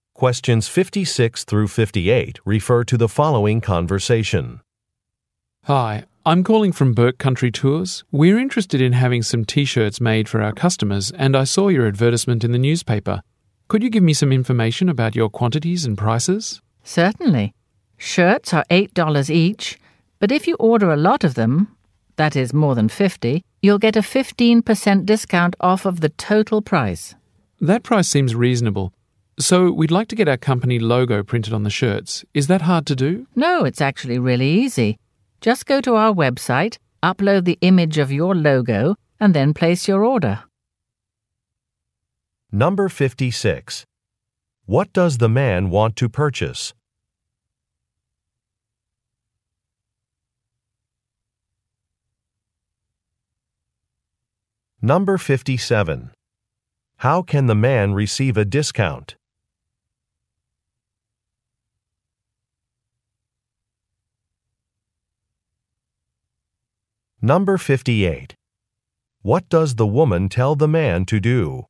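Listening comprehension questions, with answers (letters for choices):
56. What does the man want to purchase?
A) Company stationery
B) Advertising space in a newspaper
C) Promotional clothing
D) Web site design tools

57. How can the man receive a discount?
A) By referring potential customers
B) By signing up for a newsletter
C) By paying in advance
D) By placing a large order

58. What does the woman tell the man to do?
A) Speak with a manager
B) Visit a Web site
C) Make an appointment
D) Request a sample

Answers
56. C
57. D
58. B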